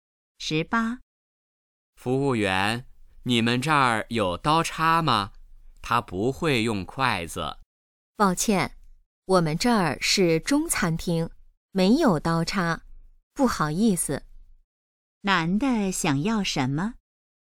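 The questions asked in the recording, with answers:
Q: 男的想要什么?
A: 刀叉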